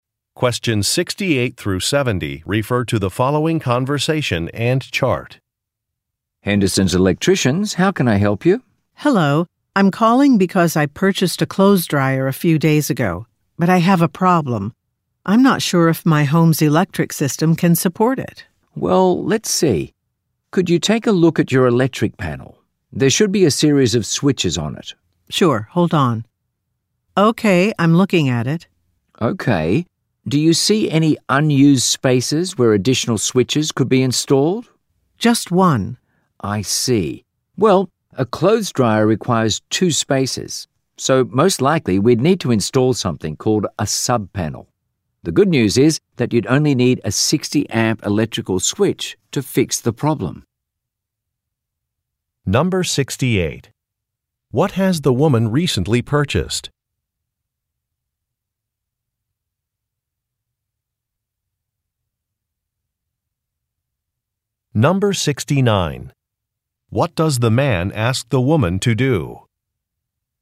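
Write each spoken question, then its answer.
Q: What has the woman recently purchased?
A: A clothes dryer

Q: What does the man ask the woman to do?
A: Look at her electric panel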